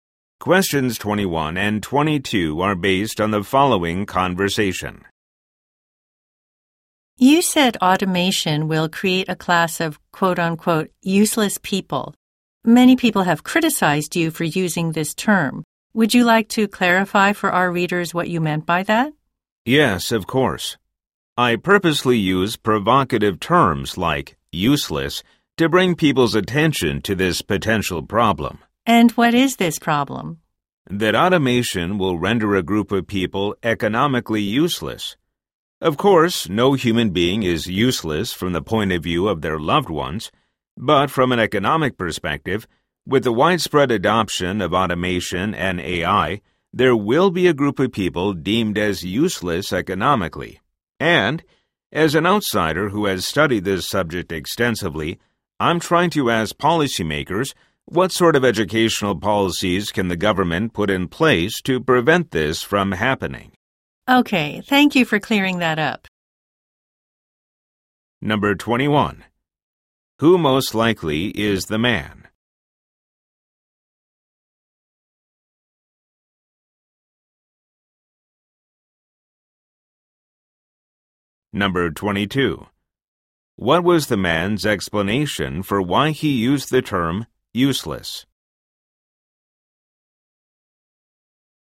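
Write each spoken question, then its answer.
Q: What was the man's explanation for why he used the term useless?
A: To draw people's attention to the problem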